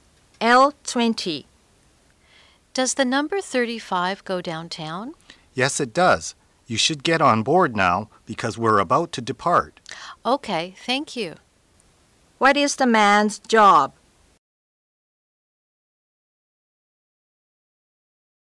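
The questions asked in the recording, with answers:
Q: What is the man's job?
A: Bus driver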